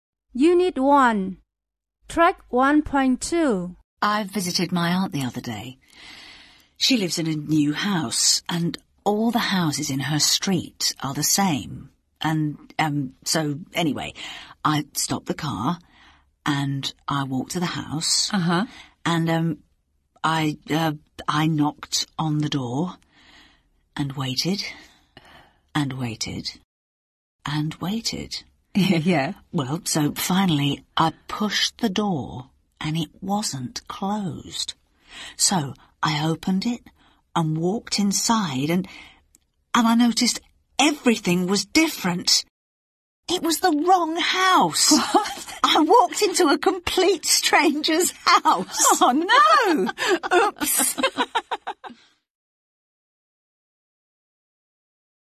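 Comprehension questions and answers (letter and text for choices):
Listen to the story. Choose the best title.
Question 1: Listen to the story. Choose the best title.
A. The Old House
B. My Aunt's House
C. The Wrong House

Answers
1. C. The Wrong House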